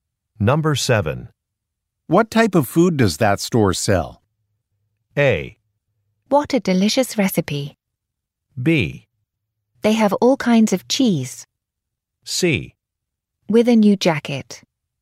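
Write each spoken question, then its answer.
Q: What type of food does that store sell?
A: B: They have all kinds of cheese.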